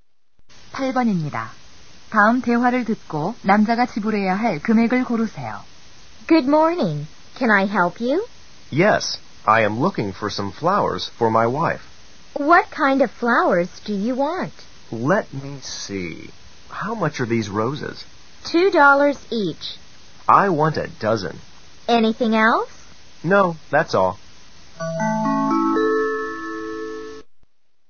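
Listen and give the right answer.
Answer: 24달러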